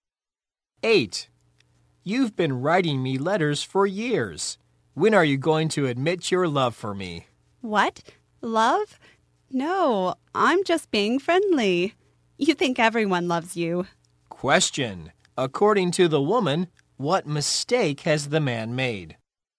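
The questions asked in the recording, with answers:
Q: According to the woman, what mistake has the man made?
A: He thinks she loves him, but she is just being friendly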